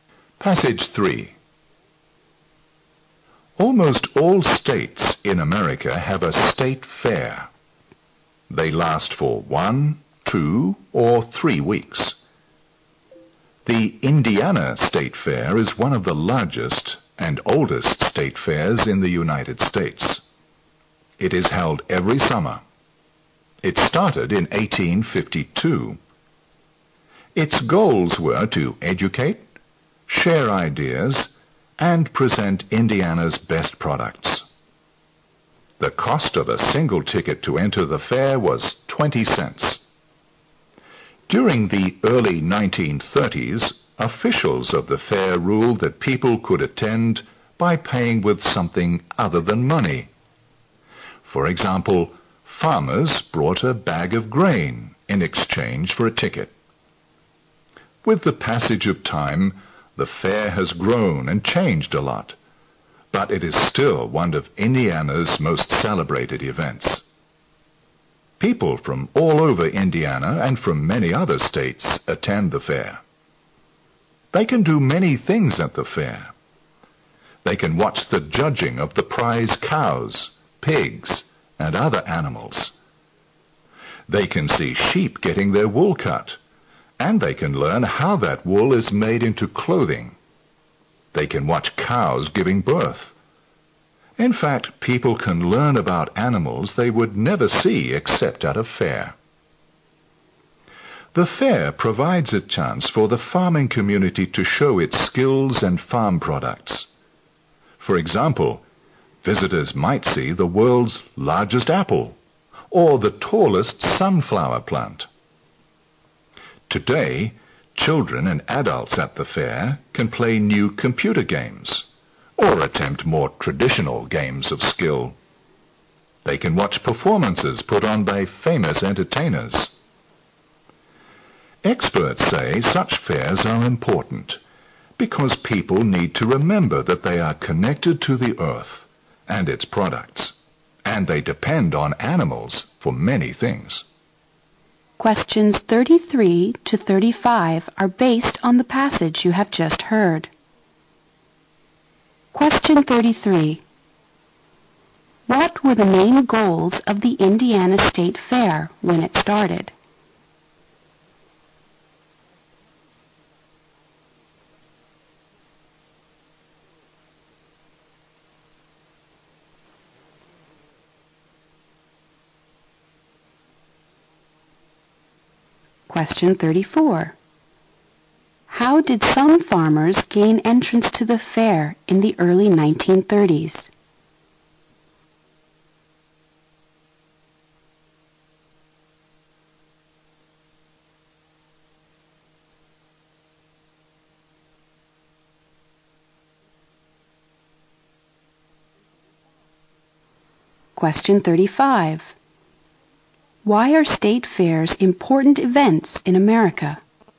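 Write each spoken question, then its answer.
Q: What were the main goals of the Indiana State Fair when it started?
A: To educate, share ideas and present Indiana's best products.

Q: How did some farmers gain entrance to the fair in the early 1930s?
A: By bringing a bag of grain instead of paying money.

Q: Why are state fairs important events in America?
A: They remind people that they are connected to the earth and its products and depend on animals.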